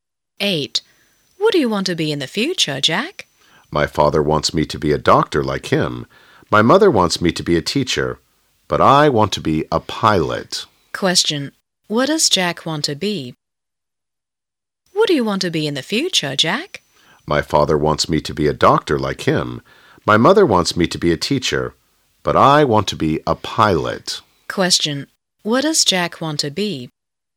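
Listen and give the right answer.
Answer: A pilot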